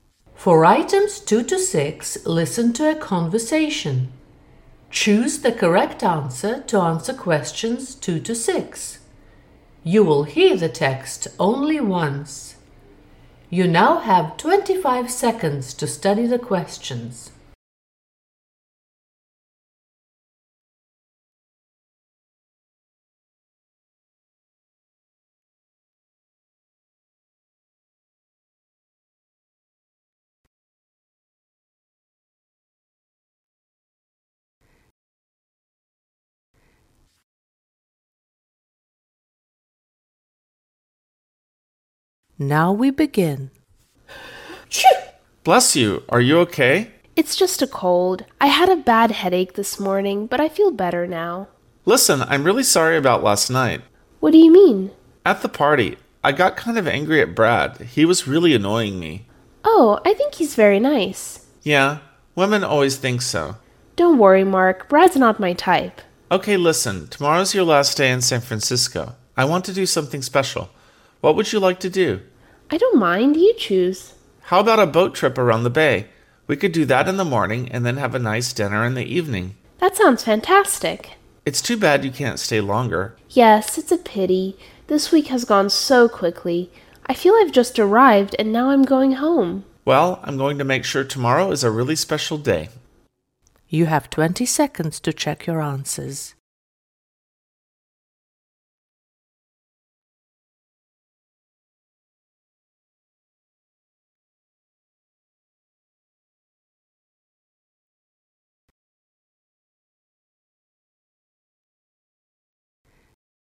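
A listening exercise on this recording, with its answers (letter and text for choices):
For items 2-6 listen to a conversation. Choose the correct answer to answer questions 2-6. You will hear the text only once.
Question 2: At the beginning of the conversation, Allie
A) has a cold.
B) feels fine.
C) has a bad headache.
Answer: A) has a cold.

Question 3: At the party Mark felt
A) frustrated.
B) annoyed.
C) sorry.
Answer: B) annoyed.

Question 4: What is NOT TRUE about Brad?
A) He can be irritating.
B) He isn't Allie's type of man.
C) Women don't find him nice.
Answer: C) Women don't find him nice.

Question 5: What does Allie want to do on her last day in San Franciscо?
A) Something special.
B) Nothing special.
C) She doesn't care.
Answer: C) She doesn't care.

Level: 9 класс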